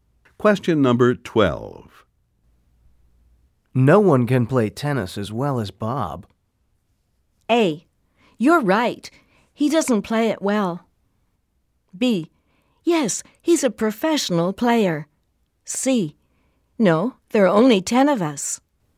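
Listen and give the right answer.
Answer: B: Yes, he's a professional player.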